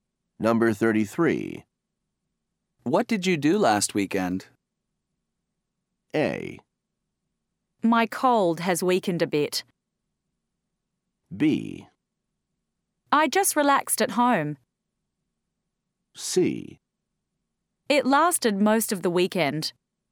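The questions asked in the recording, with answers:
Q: What did you do last weekend?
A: B: I just relaxed at home.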